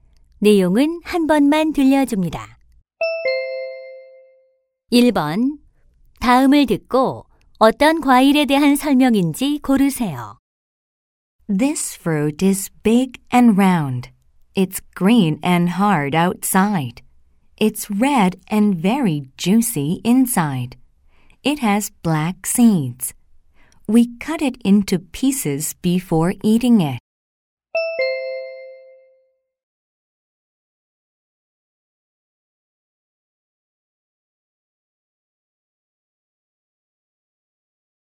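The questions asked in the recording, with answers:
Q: 다음을 듣고 어떤 과일에 대한 설명인지 고르세요.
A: 수박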